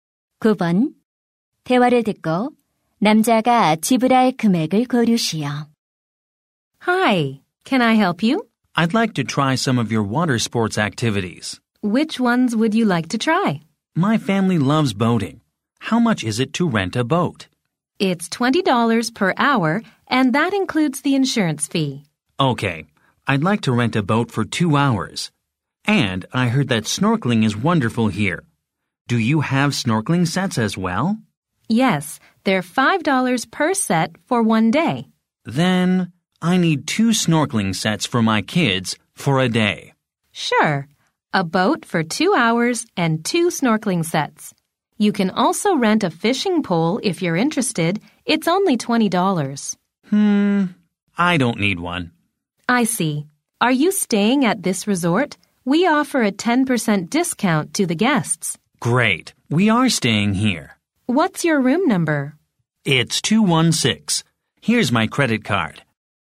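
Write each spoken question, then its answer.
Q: 대화를 듣고 남자가 지불할 금액을 고르시오.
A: 45달러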